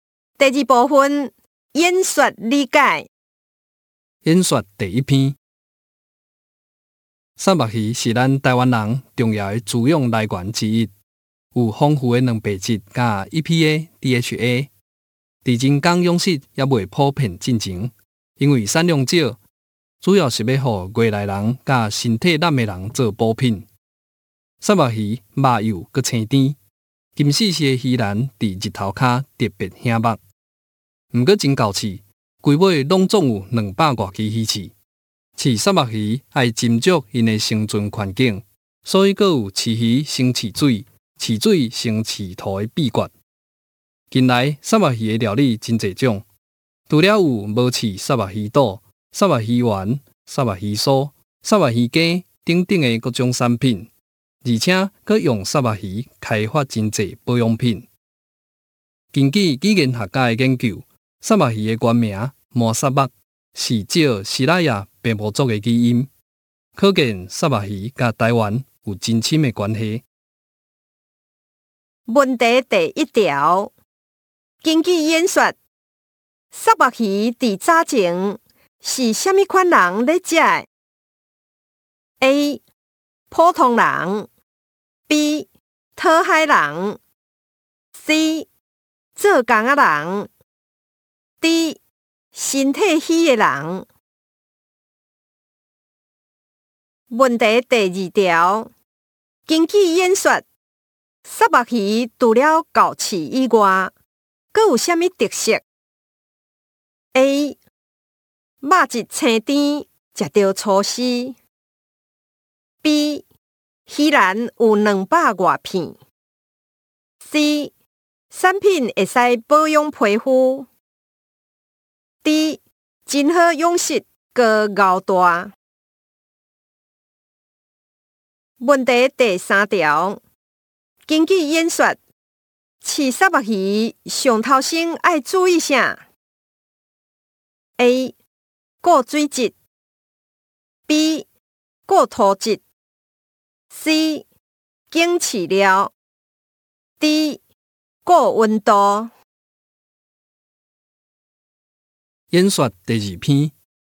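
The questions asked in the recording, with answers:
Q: 根据演说。三目鱼伫早前是虾米款人咧食 ?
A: D: 身体虚的人

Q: 根据演说,三目鱼除了够刺以外,阁有虾米特色?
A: A: 肉质清甜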